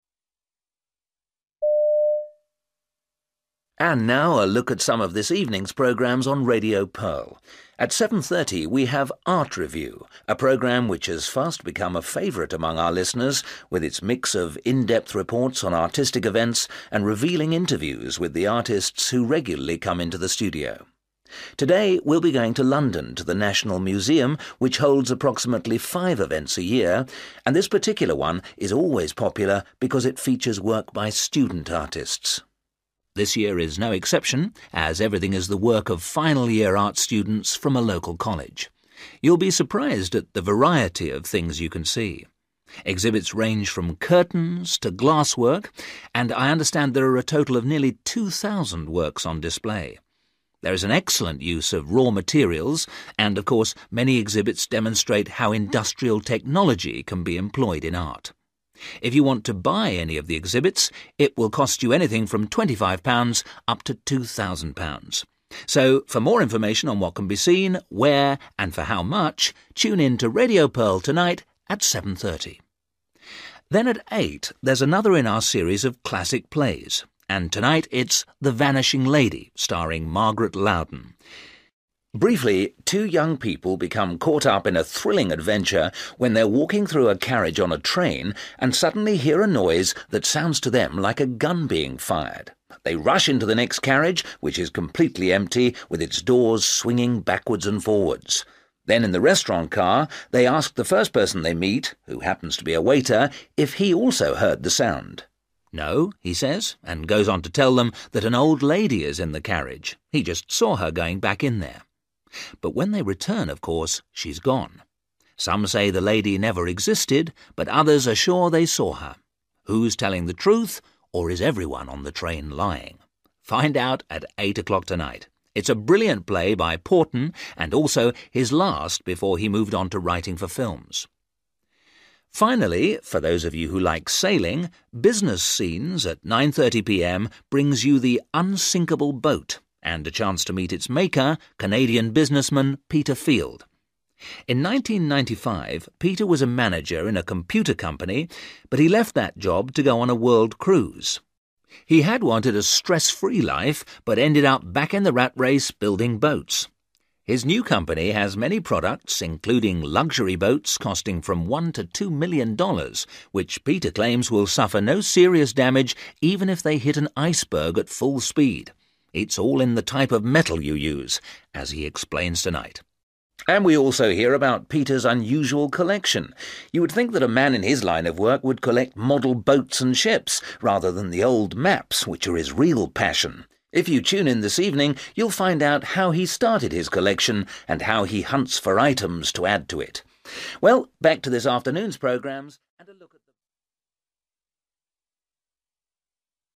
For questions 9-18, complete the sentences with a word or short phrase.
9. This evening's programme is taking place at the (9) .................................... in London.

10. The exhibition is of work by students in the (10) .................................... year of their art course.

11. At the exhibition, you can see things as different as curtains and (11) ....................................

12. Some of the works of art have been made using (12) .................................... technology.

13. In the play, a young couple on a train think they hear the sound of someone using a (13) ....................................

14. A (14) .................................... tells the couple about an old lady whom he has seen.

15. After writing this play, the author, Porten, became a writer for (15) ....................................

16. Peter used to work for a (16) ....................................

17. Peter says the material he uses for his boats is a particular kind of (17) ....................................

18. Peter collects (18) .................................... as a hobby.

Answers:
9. National Museum
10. final / last
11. glass work / glass
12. industrial
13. gun
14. waiter
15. film(s) / movies
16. computer company
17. metal
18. (old) maps

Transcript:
And now a look at some of this evening's programmes on Radio Pearl. At 7.30 we have Art Review, a programme which has fast become a favourite among our listeners, with its mix of in-depth reports on artistic events, and revealing interviews with the artists who regularly come into the studio. Today we'll be going to London to the National Museum, which holds approximately five events a year, and this particular one is always popular because it features work by student artists.
This year is no exception as everything is the work of final-year art students from a local college. You'll be surprised at the variety of things you can see. Exhibits range from curtains to glass work, and I understand there are a total of nearly 2,000 works on display. There is an excellent use of raw materials and of course many exhibits demonstrate how industrial technology can be employed in art. If you want to buy any of the exhibits, it will cost you anything from £25 up to £2,000. So for more information on what can be seen, where and for how much, tune in to Radio Pearl tonight at 7.30.
Then at 8.00, there's another in our series of classic plays and tonight it's The Vanishing Lady, starring Margaret Louden.
Briefly, two young people become caught up in a thrilling adventure when they are walking through a carriage on a train and suddenly hear a noise that sounds to them like a gun being fired. They rush into the next carriage which is completely empty with its doors swinging backwards and forwards. Then in the restaurant car they ask the first person they meet – who happens to be a waiter – if he also heard the sound.
'No', he says, and goes on to tell them that an old lady is in the carriage – he just saw her going back in there. But when they return, of course, she's gone. Some say the lady never existed but others are sure they saw her. Who's telling the truth, or is everyone on the train lying? Find out at 8 o'clock tonight. It's a brilliant play by Porten and also his last before he moved on to writing for films.
Finally, for those of you who like sailing, Business Scenes at 9.30 p.m. brings you the 'unsinkable' boat and a chance to meet its maker, Canadian businessman Peter Field. In 1995, Peter was a manager in a computer company but he left that job to go on a world cruise. He had wanted a stress-free life but ended up back in the rat race, building boats. His new company has many products including luxury boats costing from $1-2 million, which Peter claims will suffer no serious damage even if they hit an iceberg at full speed ... It's all in the type of metal you use, as he explains tonight.
And we also hear about Peter's unusual collection. You would think that a man in his line of work would collect model boats and ships, rather than the old maps which are his real passion! If you tune in this evening, you'll find out how he started his collection and how he hunts for items to add to it!
Well, back to this afternoon's programmes ...